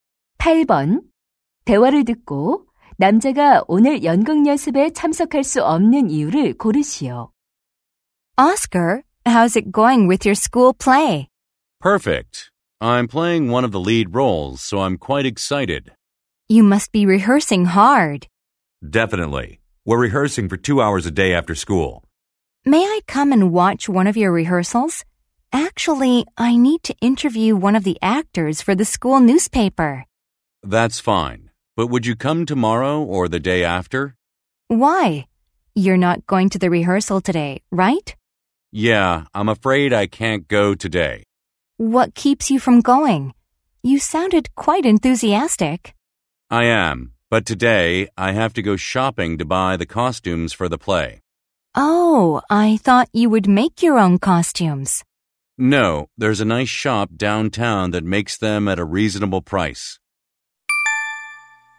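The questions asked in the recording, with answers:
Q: 대화를 듣고 남자가 오늘 연극 연습에 참석할 수 없는 이유를 고르시오.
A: 연극 의상을 사러 가야 해서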